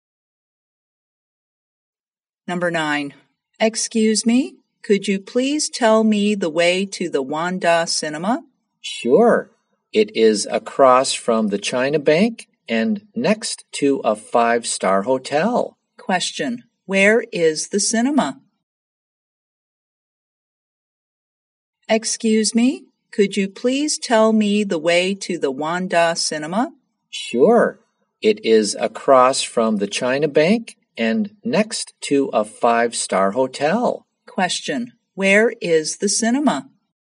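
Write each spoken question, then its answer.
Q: where is the cinema?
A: Across from the China Bank, next to a 5-star hotel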